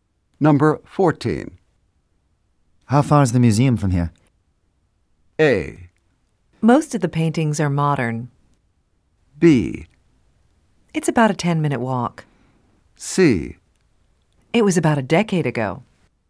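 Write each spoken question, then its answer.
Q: How far is the museum from here?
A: B: It's about a 10-minute walk.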